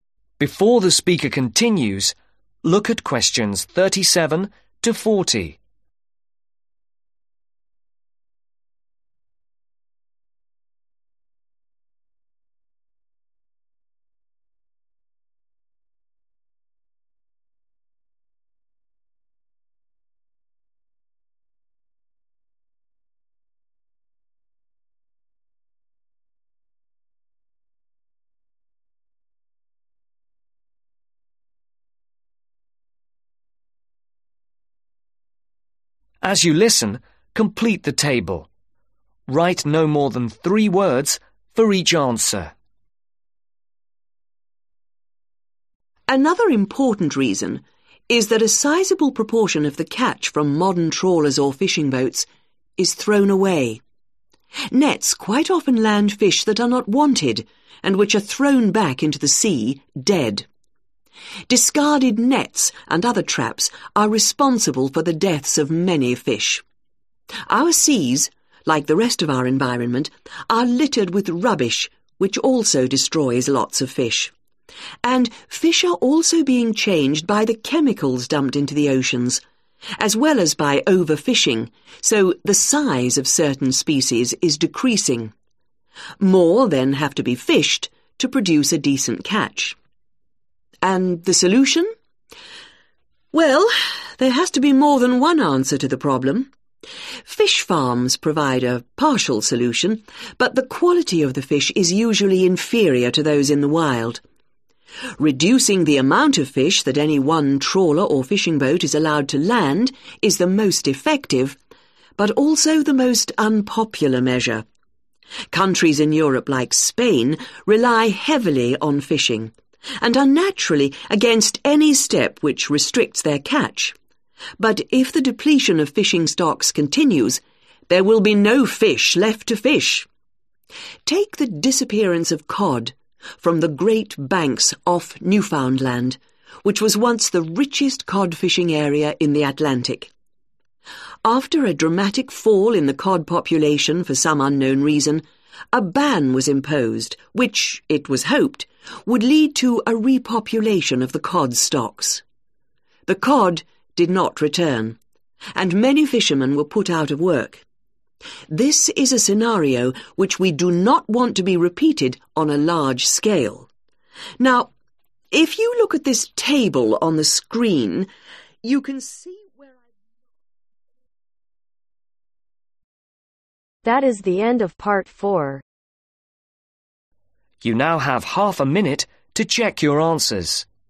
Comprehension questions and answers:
Write NO MORE THAN THREE WORDS for each answer.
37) A large (37)............ of catch nowadays is discarded.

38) (38)............ and nets are to blame for the deaths of many fish.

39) (39)............ are not a complete solution.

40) Newfoundland, where (40)............ disappeared.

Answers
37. Proportion
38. Rubbish/others Traps
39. Fish Farms
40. COD STOCKS ,(THE) COD Populations